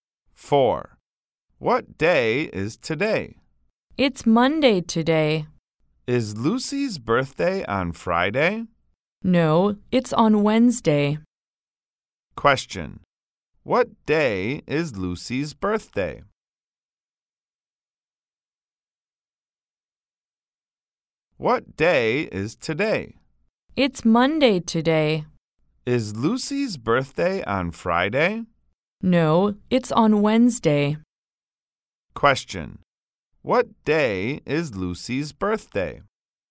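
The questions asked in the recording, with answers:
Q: What day is Lucy's birthday?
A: Wednesday.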